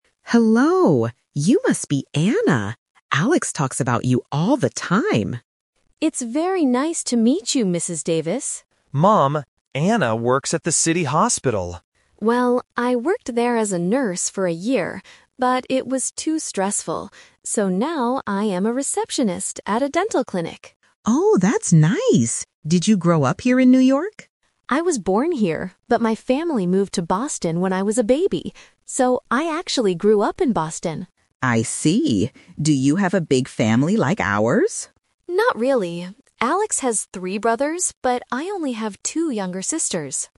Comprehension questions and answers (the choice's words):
Listen to Alex introducing his girlfriend, Anna, to his mother. For each question, choose the correct answer (A, B, or C).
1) What is Anna's job now?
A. A nurse.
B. A receptionist.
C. A dentist.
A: A receptionist.

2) Where did Anna grow up?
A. In New York.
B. In Boston.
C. In Chicago.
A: In Boston.

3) Who are the other children in Anna's family?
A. Three brothers.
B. Two younger sisters.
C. She doesn't have any brothers or sisters.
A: Two younger sisters.

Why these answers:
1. Anna says, "So now I am a receptionist at a dental clinic." Why the traps are wrong: Option A is a "Twist Trap". Alex says she works at the hospital, and Anna confirms she was a nurse there, but she changed her job because it was stressful. Option C is plausible because she works at a dental clinic, but she is not the dentist.
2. Anna says, "So, I actually grew up in Boston." Why the traps are wrong: Option A is the trap. She was born in New York, but her family moved when she was a baby, so she didn't grow up there. Option C is not mentioned in the audio.
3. Anna clearly states, "I only have two younger sisters." Why the traps are wrong: Option A is a "Speaker Confusion" trap. Alex is the one who has three brothers, not Anna. Option C is incorrect.

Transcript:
Mother: Hello! You must be Anna. Alex talks about you all the time.
Anna: It's very nice to meet you, Mrs. Davis.
Alex: Mom, Anna works at the city hospital.
Anna: Well, I worked there as a nurse for a year, but it was too stressful. So now I am a receptionist at a dental clinic.
Mother: Oh, that's nice! Did you grow up here in New York?
Anna: I was born here, but my family moved to Boston when I was a baby. So, I actually grew up in Boston.
Mother: I see. Do you have a big family like ours?
Anna: Not really. Alex has three brothers, but I only have two younger sisters.